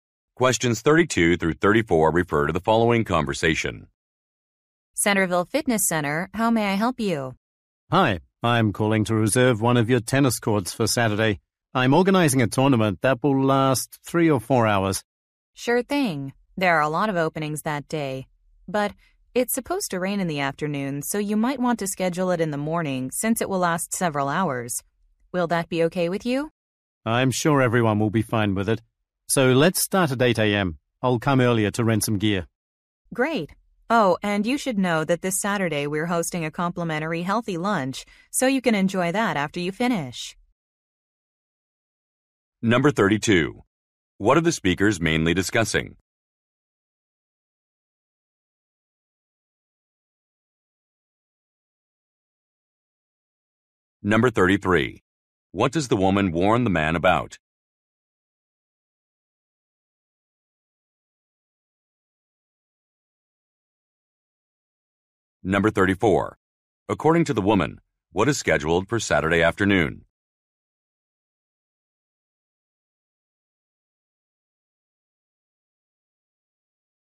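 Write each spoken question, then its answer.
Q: What are the speakers mainly discussing?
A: Reserving a tennis court

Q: What does the woman warn the man about?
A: It's supposed to rain in the afternoon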